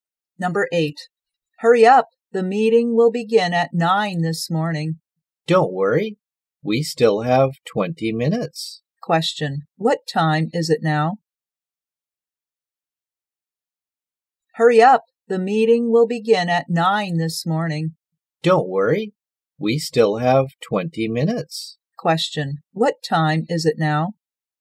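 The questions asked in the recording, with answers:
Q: Question. What time is it now?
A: 8:40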